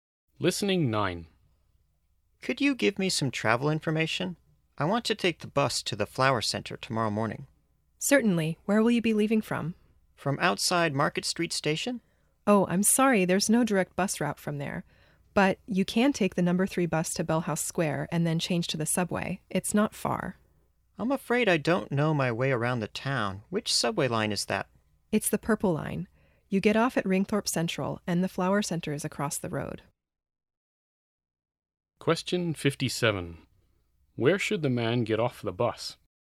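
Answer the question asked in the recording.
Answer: Bellhouse Square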